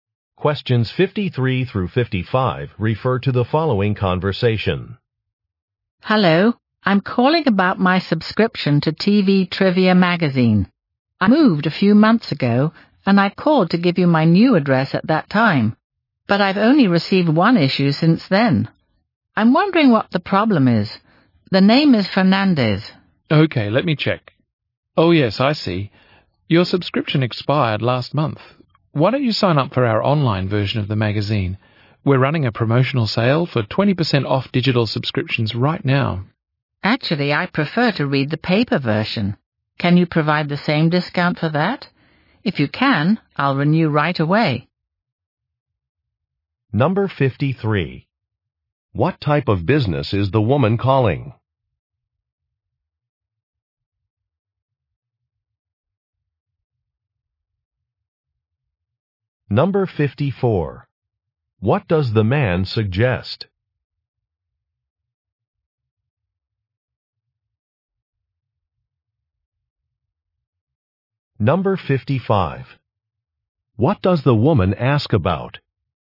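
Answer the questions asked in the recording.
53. A magazine publisher
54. Signing up for the online version
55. A discount on the paper version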